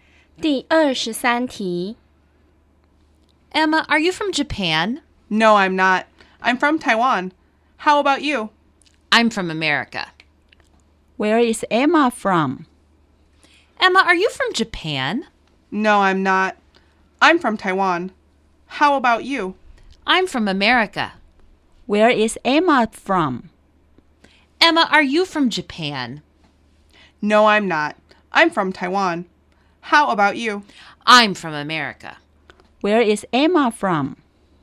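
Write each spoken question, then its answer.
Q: Where is Emma from?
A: Taiwan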